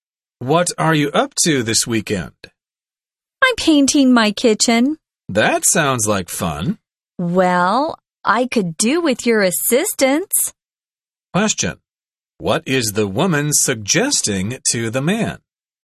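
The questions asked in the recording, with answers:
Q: What is the woman suggesting to the man?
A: That he help her paint her kitchen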